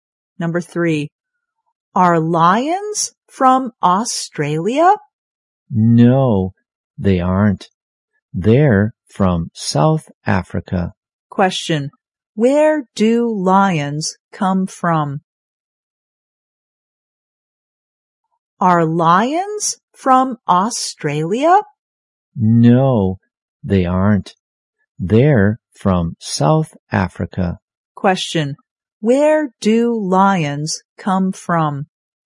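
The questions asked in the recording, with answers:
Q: where do lions come from?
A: South Africa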